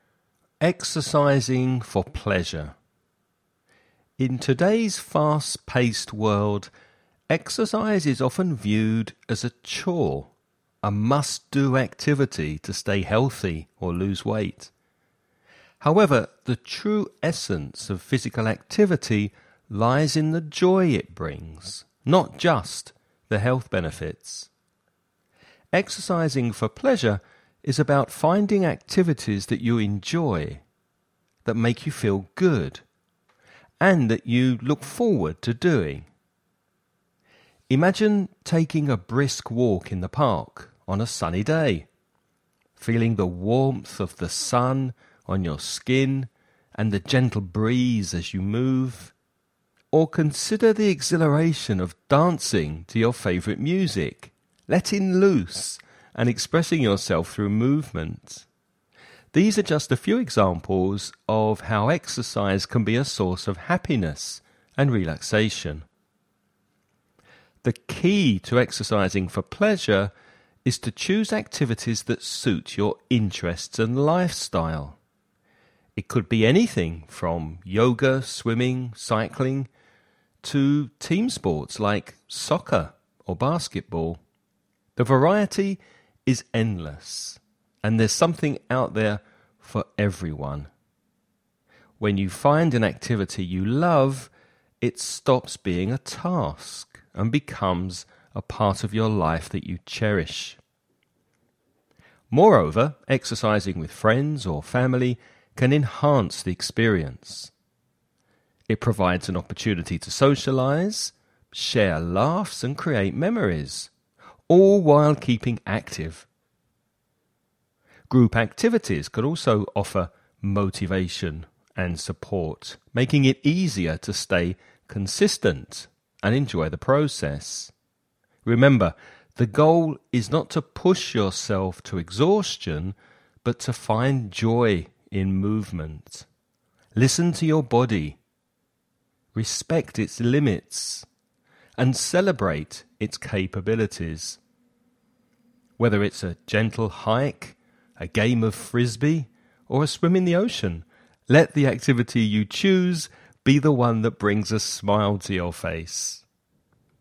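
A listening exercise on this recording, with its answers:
Now listen and answer the questions.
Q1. Give two examples of activities that can be considered exercising for pleasure.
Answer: A brisk walk in the park and dancing to your favourite music.

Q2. How can exercising with others enhance the experience?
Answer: It gives a chance to socialize, share laughs and create memories, and it offers motivation and support.

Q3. What should be the goal when choosing an exercise activity?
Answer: To find joy in movement, not to push yourself to exhaustion.

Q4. Why is it important to listen to your body during exercise?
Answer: To respect its limits and celebrate its capabilities.

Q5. How does the text suggest one should feel after exercising?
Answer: Happy; the activity should bring a smile to your face.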